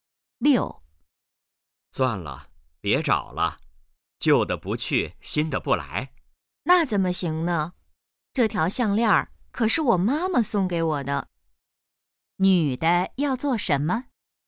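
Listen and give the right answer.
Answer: 继续找项链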